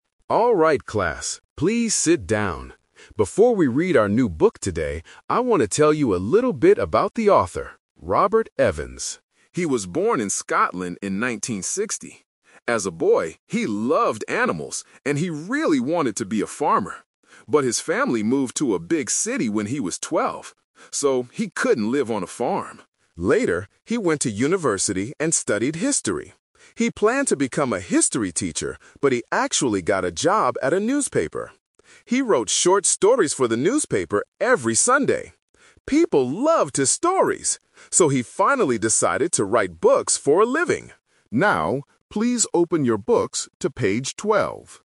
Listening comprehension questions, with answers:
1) What did Robert want to be when he was a boy?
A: A farmer.

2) What did Robert study at university?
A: History.

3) What was Robert's first job?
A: A newspaper writer.

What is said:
Teacher: Alright class, please sit down. Before we read our new book today, I want to tell you a little bit about the author, Robert Evans.
He was born in Scotland in 1960. As a boy, he loved animals, and he really wanted to be a farmer. But his family moved to a big city when he was twelve. So, he couldn't live on a farm.
Later, he went to university and studied history. He planned to become a history teacher, but he actually got a job at a newspaper. He wrote short stories for the newspaper every Sunday. People loved his stories! So, he finally decided to write books for a living.
Now, please open your books to page 12.